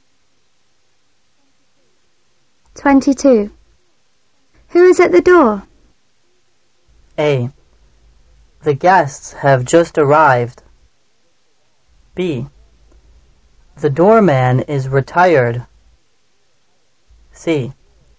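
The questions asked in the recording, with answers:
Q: Who is at the door?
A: A: The guests have just arrived.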